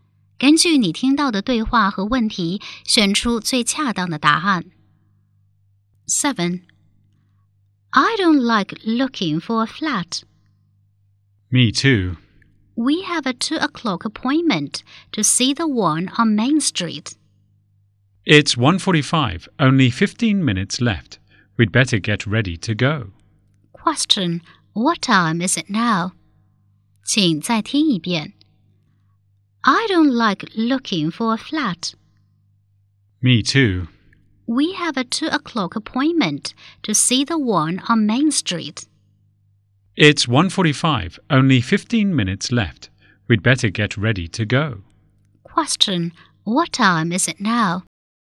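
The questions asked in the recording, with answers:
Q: Question, what time is it now?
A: 1:45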